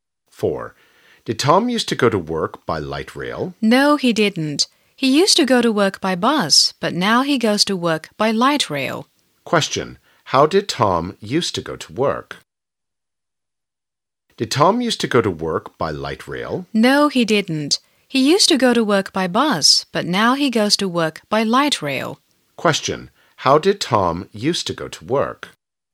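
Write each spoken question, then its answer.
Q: how did Tom used to go to work?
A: By bus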